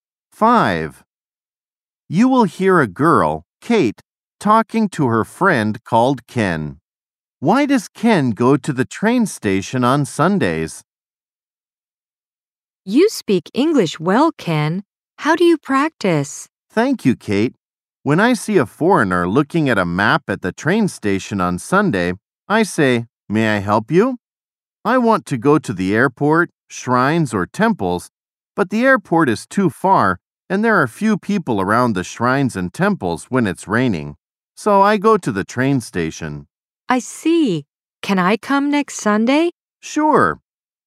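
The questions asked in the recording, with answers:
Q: Why does Ken go to the train station on Sundays?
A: To practice English by helping foreigners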